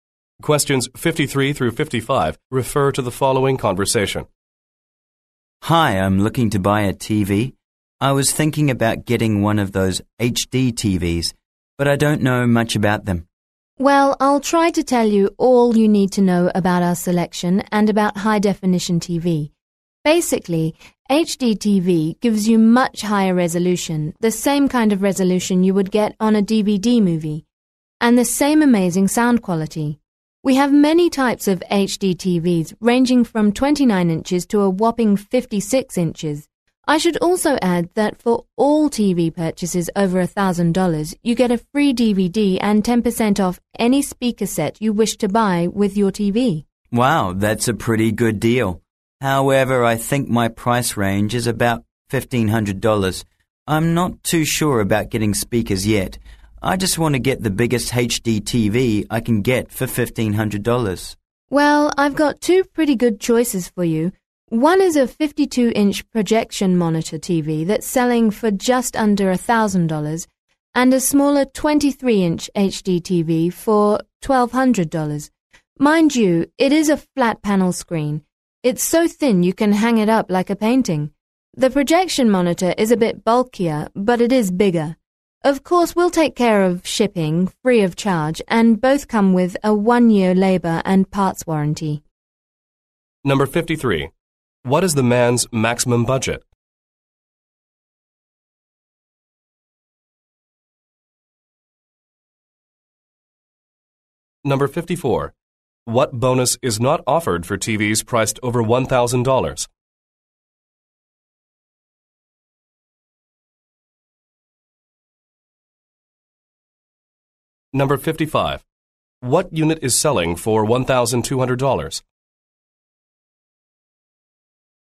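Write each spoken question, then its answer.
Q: What is the man's maximum budget?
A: $1,500

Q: What unit is selling for $1,200?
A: The 23-inch flat-panel HD TV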